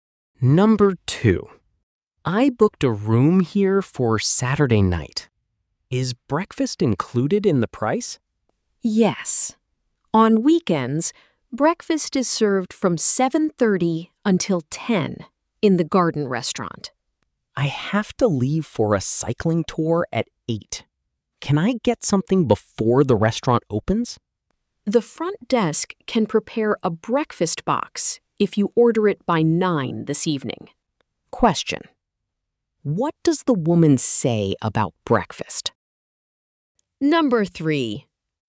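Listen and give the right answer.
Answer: The front desk can prepare a breakfast box if he orders it by 9 this evening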